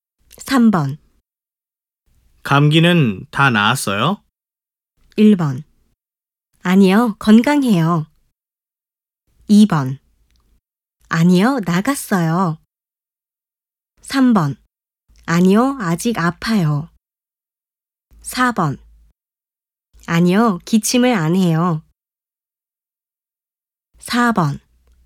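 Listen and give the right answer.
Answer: 3: 아니요, 아직 아파요.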